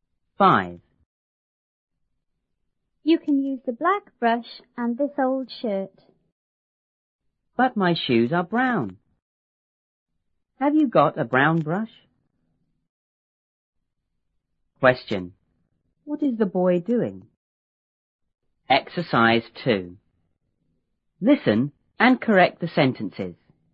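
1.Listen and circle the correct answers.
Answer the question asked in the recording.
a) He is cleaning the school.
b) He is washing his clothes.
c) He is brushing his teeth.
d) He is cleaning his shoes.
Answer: d) He is cleaning his shoes.

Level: 初中英语广州版1B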